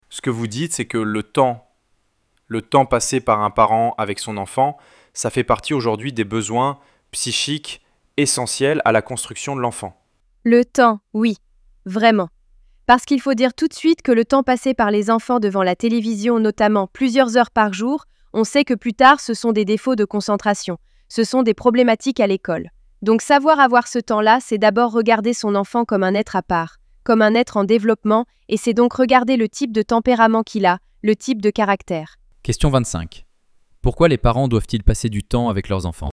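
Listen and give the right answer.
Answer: Parce que c'est un besoin psychique essentiel à la construction de l'enfant.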